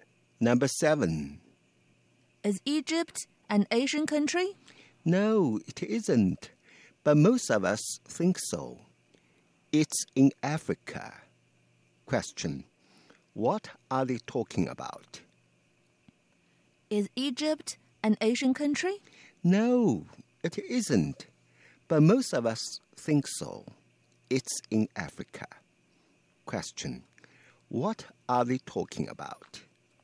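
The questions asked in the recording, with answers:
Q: What are they talking about?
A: Where Egypt is (a country in Africa)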